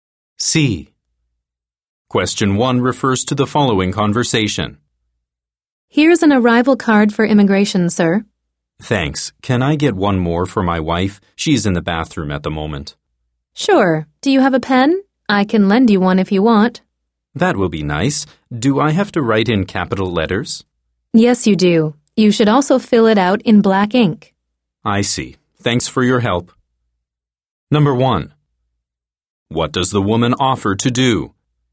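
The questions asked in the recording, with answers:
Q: What does the woman offer to do?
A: Lend him a pen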